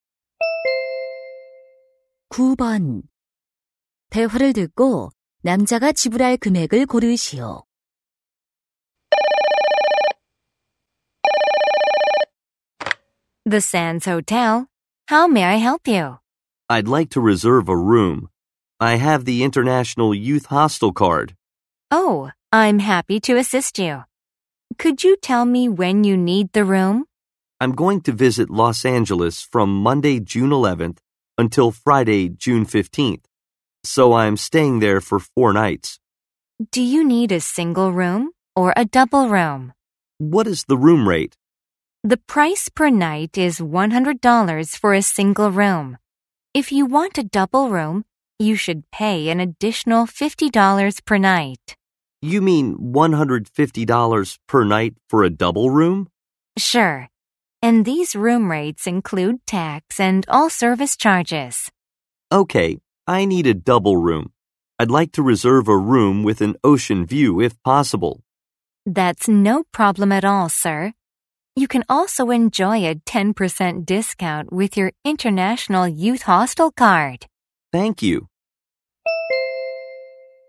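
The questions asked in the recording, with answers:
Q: 대화를 듣고 남자가 지불할 금액을 고르시오.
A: $540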